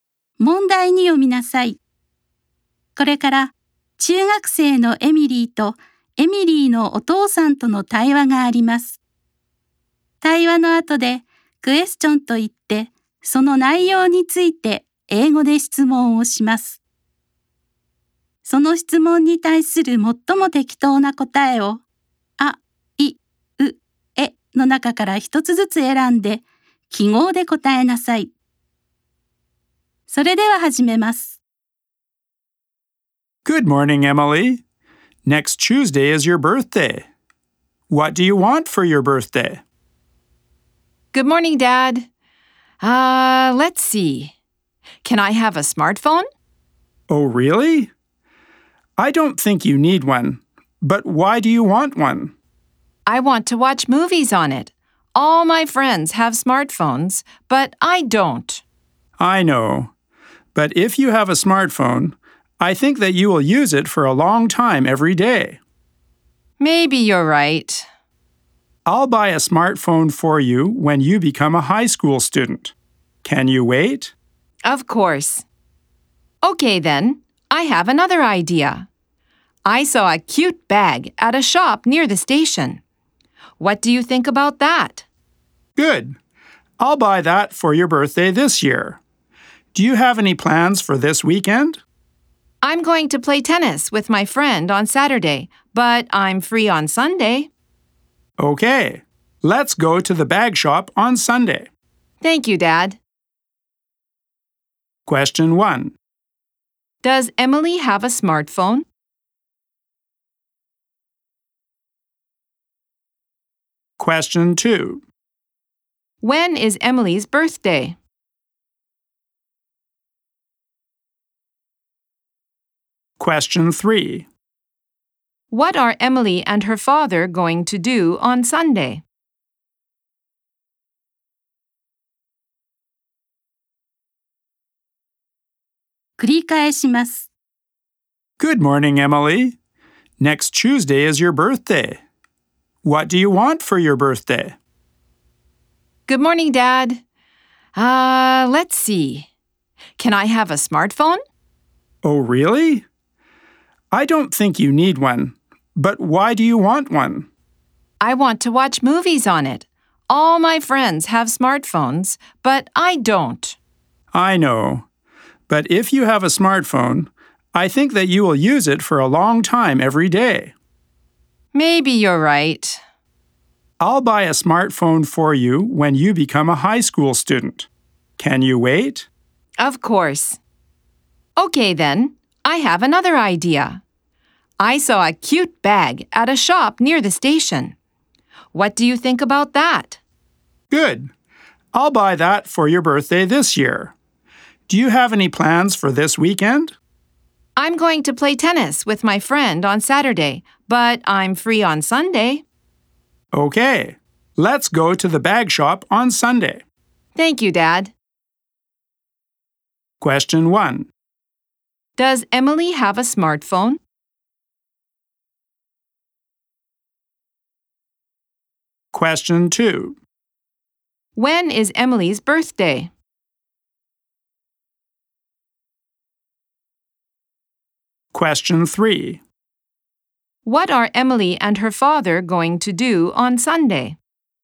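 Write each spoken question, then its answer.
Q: Does Emily have a smartphone?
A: No, she doesn't.

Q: When is Emily's birthday?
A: Next Tuesday.

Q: What are Emily and her father going to do on Sunday?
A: They are going to go to the bag shop.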